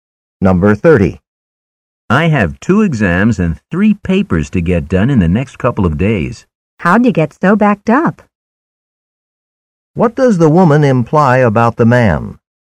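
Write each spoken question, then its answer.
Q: What does the woman imply about the man?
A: He put off his work until the last minute.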